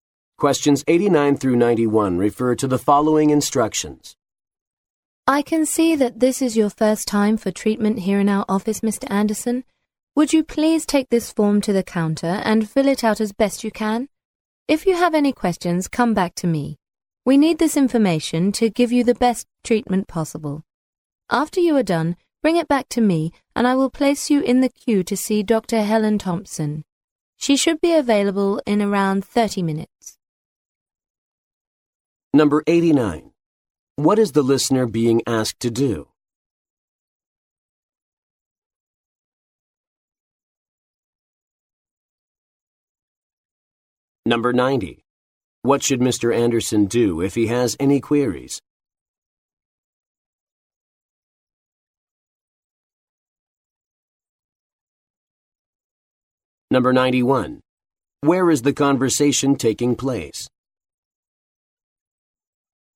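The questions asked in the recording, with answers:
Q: What is the listener being asked to do?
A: Fill out a form

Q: Anderson do if he has any queries?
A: Come back to the speaker

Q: Where is the conversation taking place?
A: In a doctor's office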